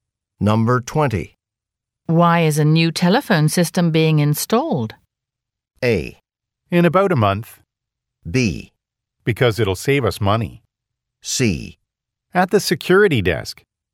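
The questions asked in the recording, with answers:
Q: Why is a new telephone system being installed?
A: B: Because it'll save us money.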